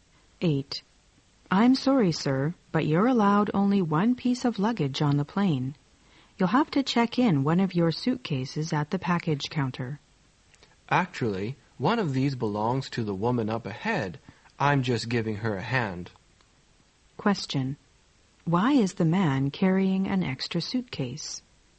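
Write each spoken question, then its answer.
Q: Why is the man carrying an extra suitcase?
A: He is helping a woman ahead of him; it is hers.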